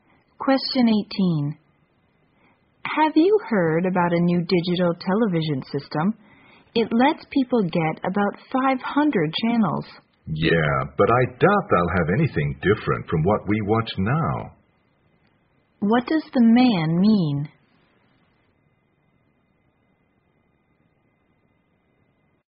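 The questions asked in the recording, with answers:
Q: What does the man mean?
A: More channels won't offer anything really new.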